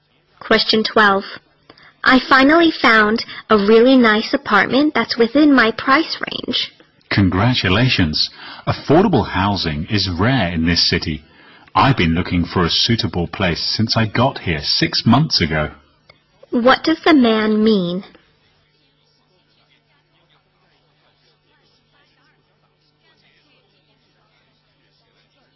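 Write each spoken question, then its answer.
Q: What does the man mean?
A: Affordable housing is hard to find in the city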